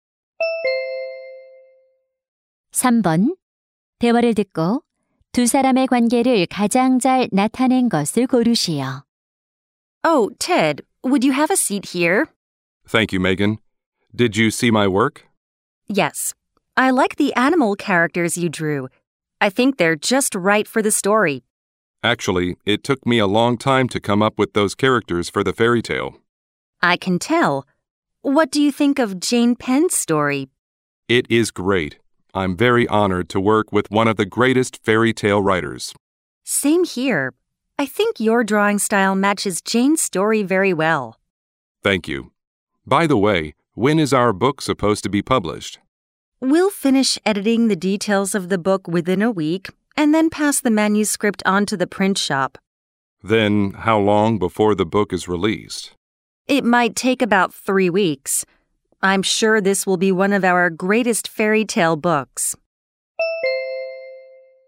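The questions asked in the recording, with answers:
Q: 대화를 듣고 두 사람의 관계를 가장 잘 나타낸 것을 고르시오.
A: 동화책 편집자 — 삽화가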